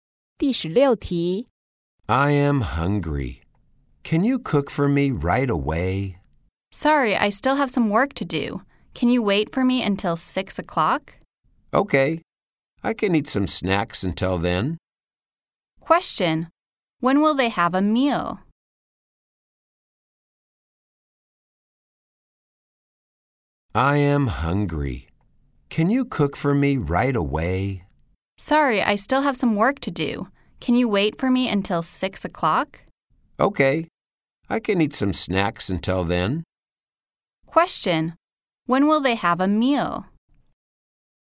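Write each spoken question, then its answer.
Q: When will they have a meal?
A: At 6 o'clock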